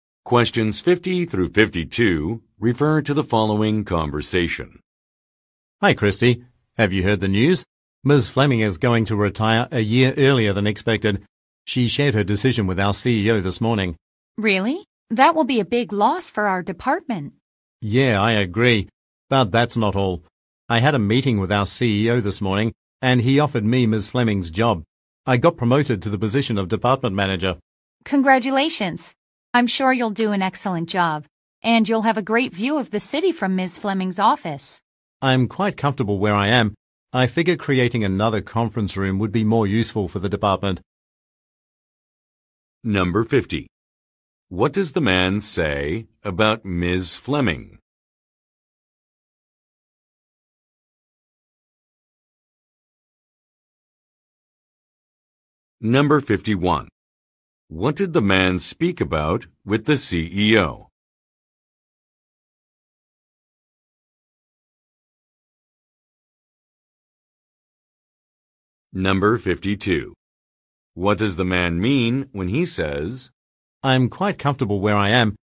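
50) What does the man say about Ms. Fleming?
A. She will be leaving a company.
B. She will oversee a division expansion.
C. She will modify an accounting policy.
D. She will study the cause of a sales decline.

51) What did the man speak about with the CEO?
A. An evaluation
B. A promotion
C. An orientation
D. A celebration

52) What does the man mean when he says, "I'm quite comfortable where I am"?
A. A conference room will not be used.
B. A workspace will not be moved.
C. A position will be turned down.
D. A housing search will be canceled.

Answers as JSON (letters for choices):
{"50": "A", "51": "B", "52": "B"}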